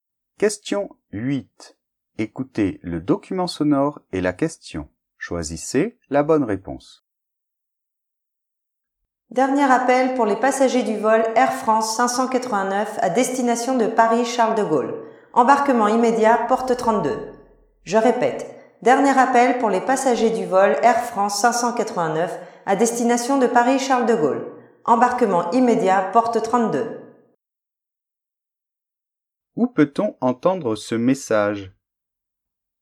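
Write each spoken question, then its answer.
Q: Où peut-on entendre ce message ?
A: À l'aéroport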